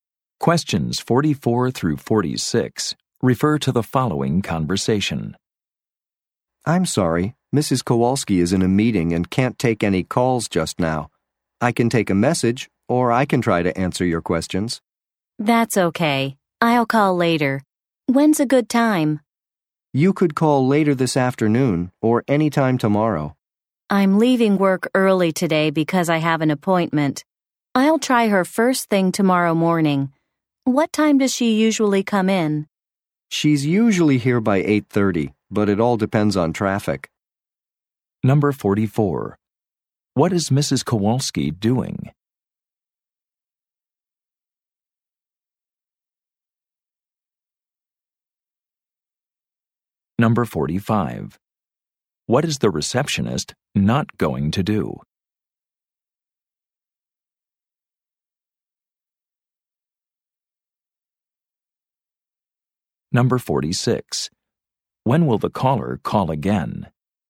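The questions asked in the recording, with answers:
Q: What is Mrs. Kowalski doing?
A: She is in a meeting

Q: When will the caller call again?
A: First thing tomorrow morning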